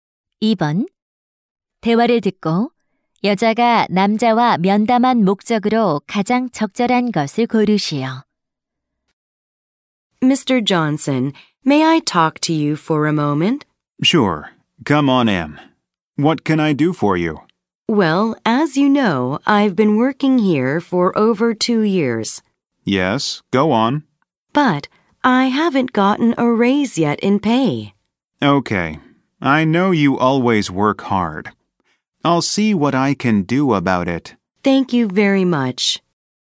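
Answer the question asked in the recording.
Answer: 급여 인상 요청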